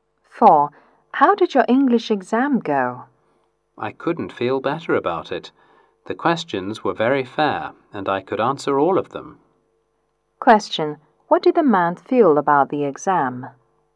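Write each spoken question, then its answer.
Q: What did the man feel about the exam?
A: He felt very good about it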